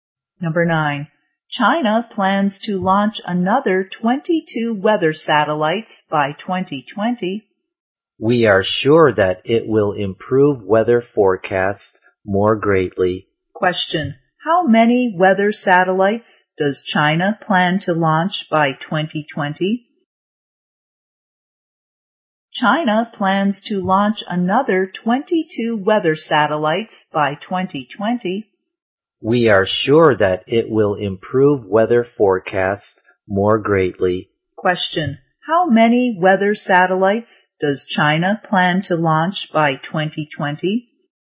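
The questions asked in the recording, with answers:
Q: How many weather satellites does China plan to launch by 2020?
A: 22 more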